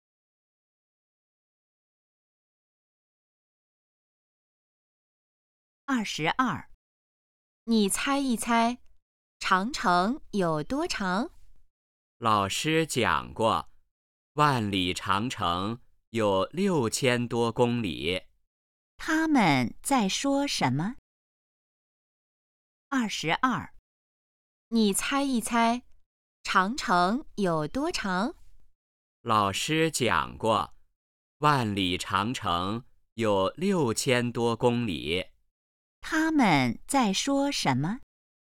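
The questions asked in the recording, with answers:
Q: 他们在说什么?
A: 长城有多长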